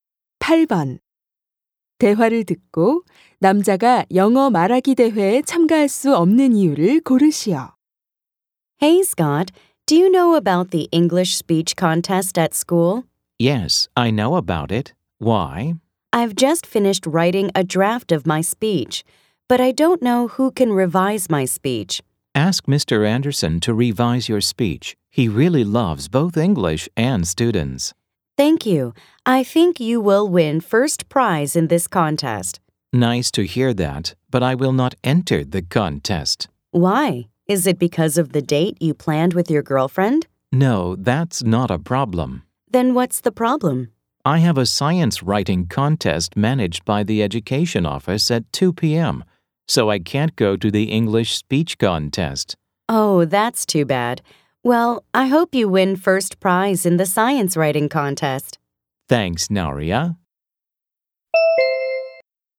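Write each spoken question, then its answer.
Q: 대화를 듣고 남자가 영어 말하기 대회에 참가할 수 없는 이유를 고르시오.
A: 같은 시간에 과학 글쓰기 대회에 참가해야 해서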